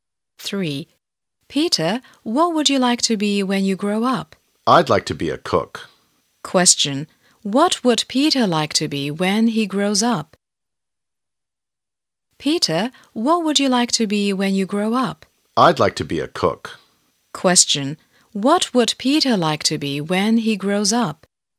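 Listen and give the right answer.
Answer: A cook.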